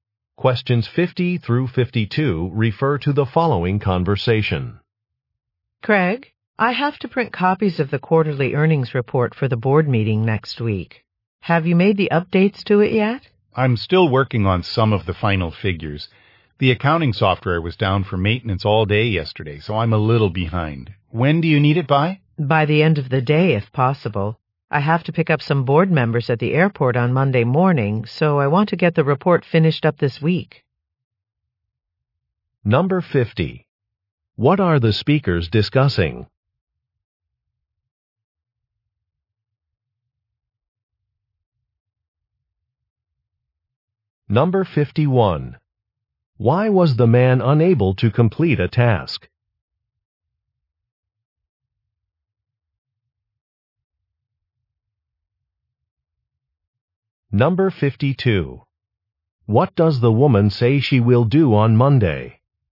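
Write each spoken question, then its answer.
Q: What are the speakers discussing?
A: The quarterly earnings report

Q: Why was the man unable to complete a task?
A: The accounting software was down for maintenance

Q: What does the woman say she will do on Monday?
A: Pick up board members at the airport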